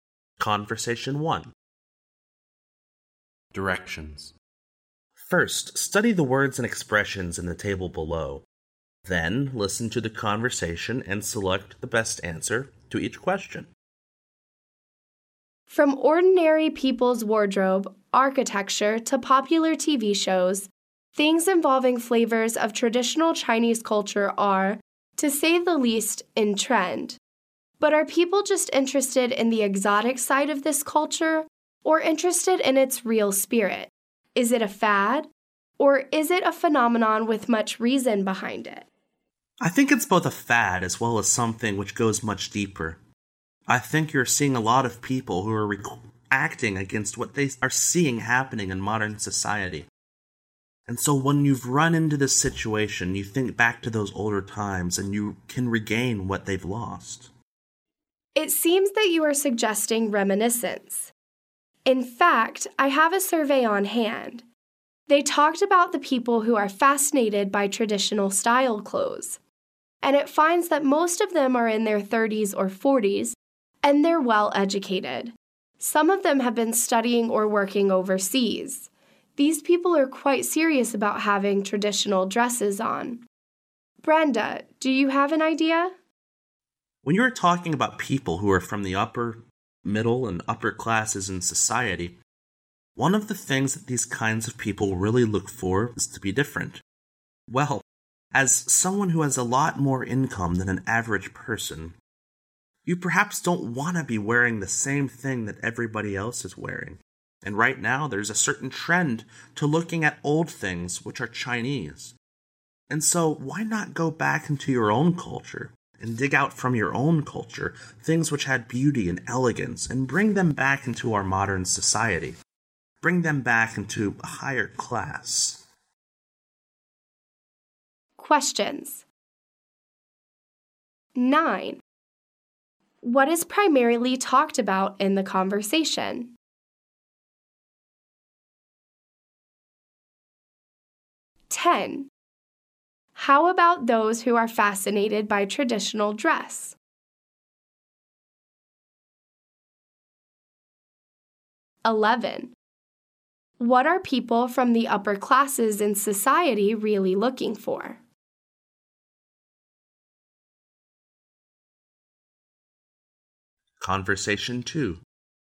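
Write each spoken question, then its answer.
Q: What is primarily talked about in the conversation?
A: The trend of traditional Chinese culture

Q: How about those who are fascinated by traditional dress?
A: Most are in their 30s or 40s and well educated

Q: What are people from the upper classes in society really looking for?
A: To be different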